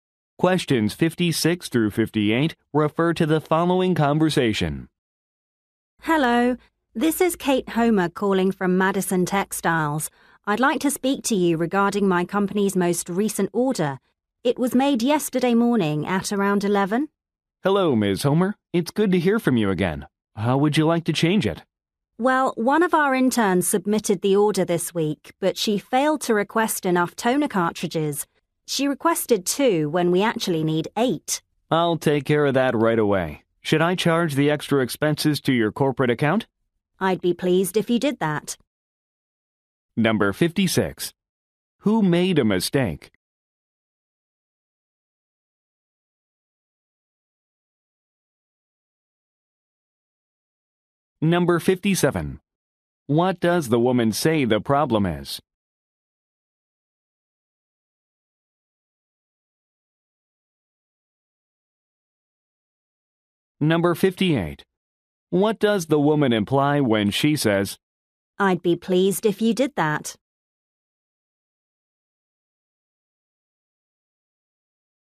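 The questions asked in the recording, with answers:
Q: Who made a mistake?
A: An intern

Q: What does the woman say the problem is?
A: Too few toner cartridges were ordered

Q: What does the woman imply when she says,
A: She agrees to charge the extra cost to her corporate account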